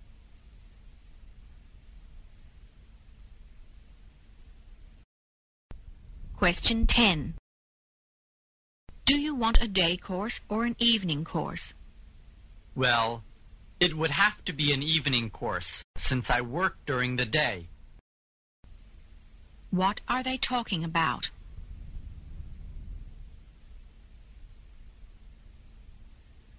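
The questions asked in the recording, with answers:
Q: What are they talking about?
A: Choosing a course (an evening course)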